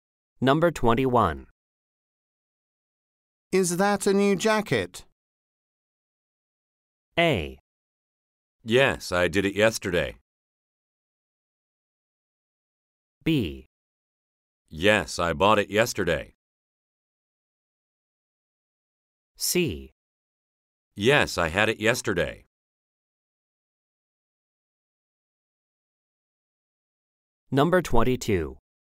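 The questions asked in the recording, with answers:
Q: Is that a new jacket?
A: B: Yes, I bought it yesterday.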